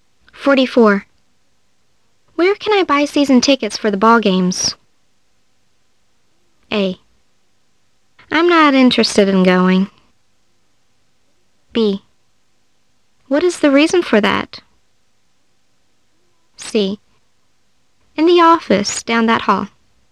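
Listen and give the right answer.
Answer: C: In the office down that hall.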